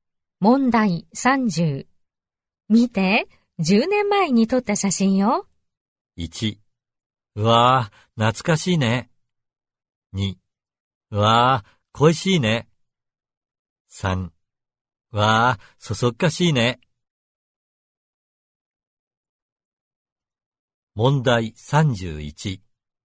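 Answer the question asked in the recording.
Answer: 1: うわぁ、懐かしいね。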